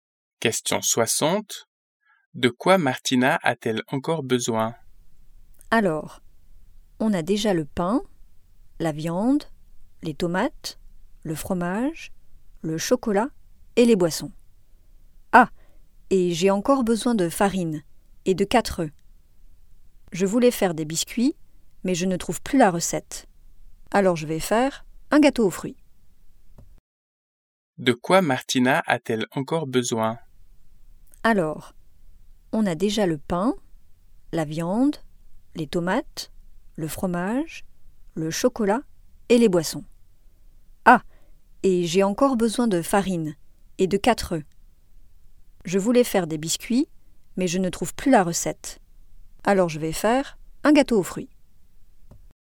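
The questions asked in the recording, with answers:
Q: De quoi Martina a-t-elle encore besoin?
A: De farine et de 4 œufs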